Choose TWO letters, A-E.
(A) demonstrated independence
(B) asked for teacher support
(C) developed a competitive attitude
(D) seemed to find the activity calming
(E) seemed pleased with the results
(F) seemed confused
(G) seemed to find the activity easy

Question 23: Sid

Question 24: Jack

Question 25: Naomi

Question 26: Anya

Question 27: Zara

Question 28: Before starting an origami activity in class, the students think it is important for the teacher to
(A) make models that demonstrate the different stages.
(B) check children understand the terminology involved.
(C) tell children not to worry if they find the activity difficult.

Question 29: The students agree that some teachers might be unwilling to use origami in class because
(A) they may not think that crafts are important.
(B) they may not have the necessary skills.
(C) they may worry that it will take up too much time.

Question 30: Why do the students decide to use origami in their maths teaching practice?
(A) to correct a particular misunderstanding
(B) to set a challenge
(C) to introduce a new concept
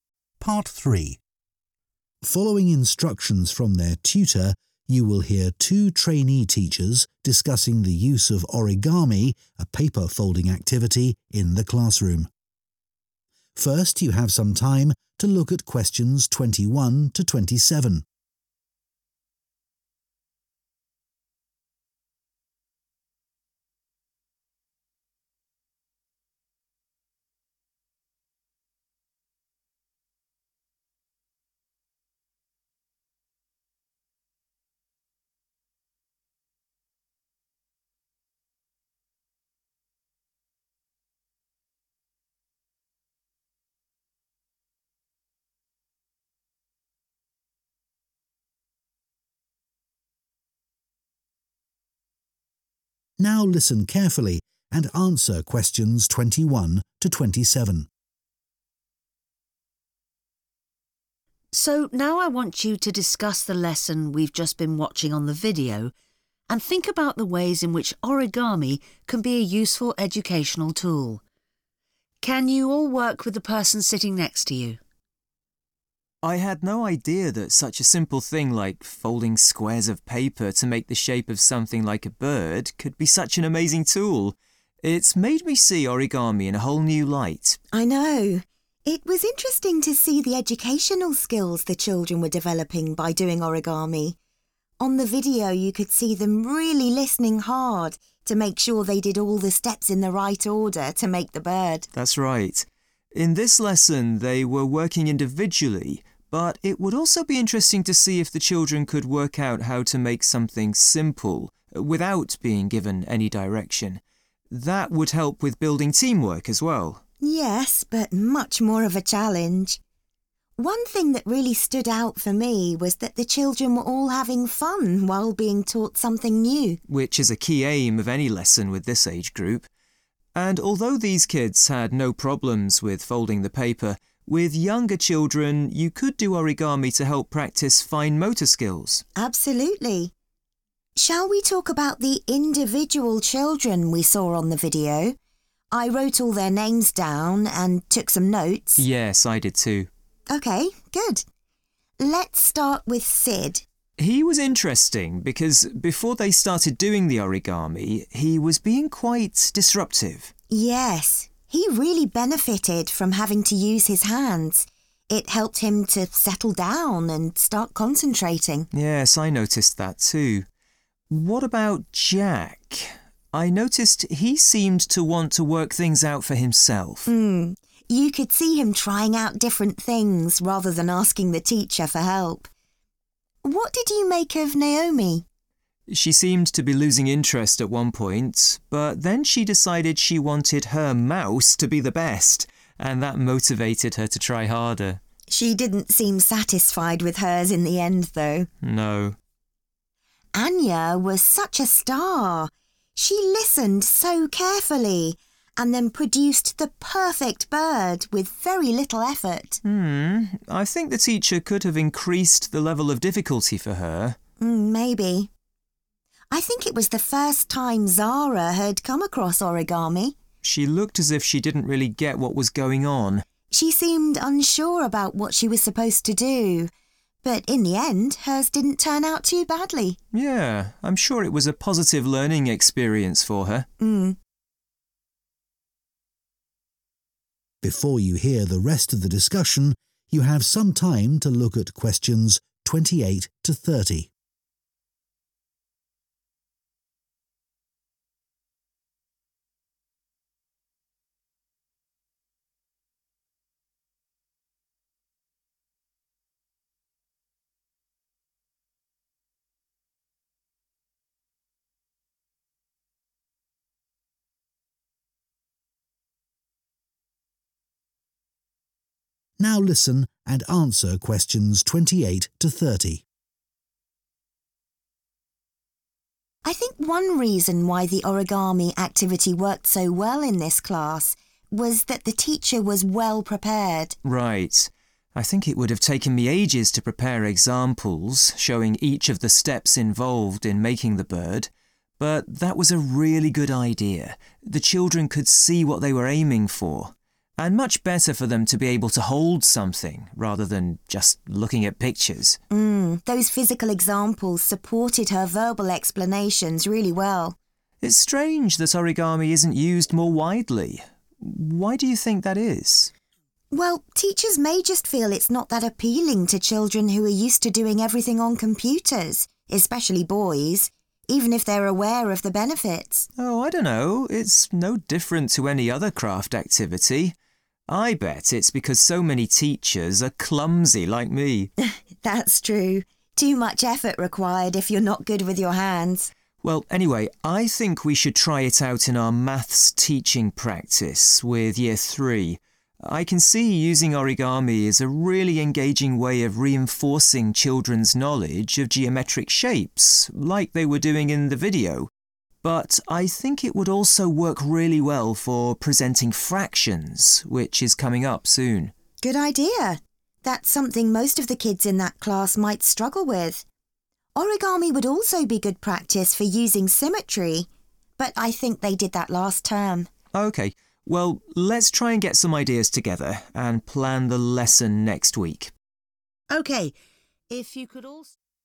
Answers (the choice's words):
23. seemed to find the activity calming
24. demonstrated independence
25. developed a competitive attitude
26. seemed to find the activity easy
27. seemed confused
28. make models that demonstrate the different stages.
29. they may not have the necessary skills.
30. to introduce a new concept